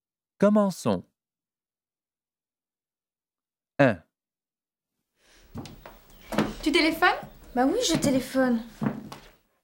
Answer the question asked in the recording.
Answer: 1, A